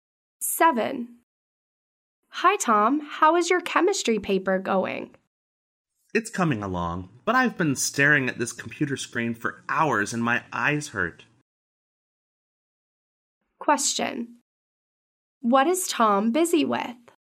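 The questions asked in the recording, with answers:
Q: What is Tom busy with?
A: His chemistry paper.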